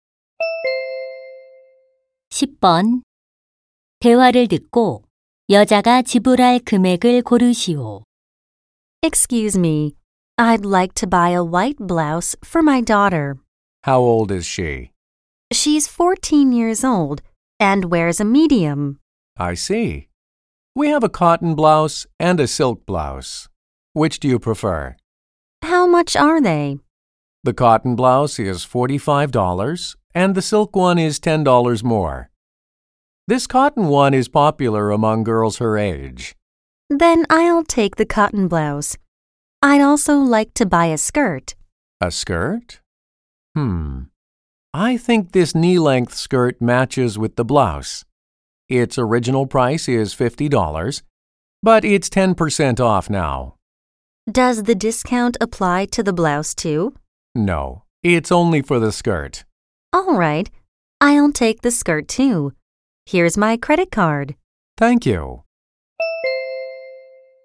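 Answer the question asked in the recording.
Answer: $90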